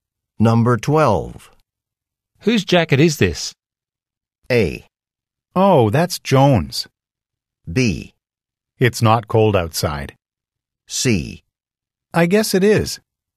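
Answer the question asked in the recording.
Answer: A: Oh, that's Joan's.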